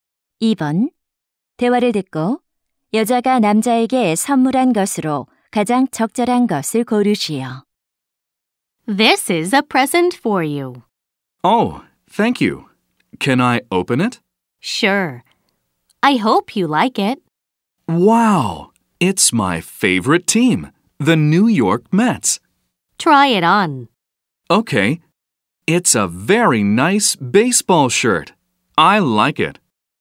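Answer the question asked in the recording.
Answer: 야구 셔츠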